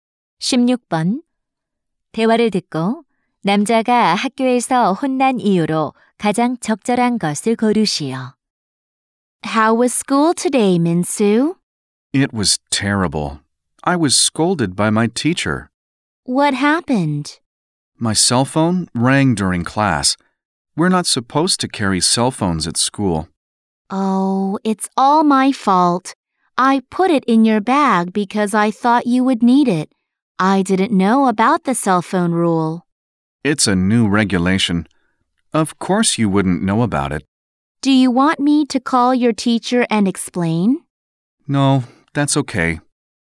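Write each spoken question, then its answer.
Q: 대화를 듣고 남자가 학교에서 혼난 이유로 가장 적절한 것을 고르시오.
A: 수업 중 휴대전화가 울려서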